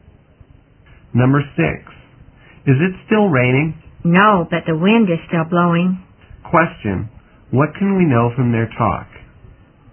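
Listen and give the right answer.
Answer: It has stopped raining but it is still windy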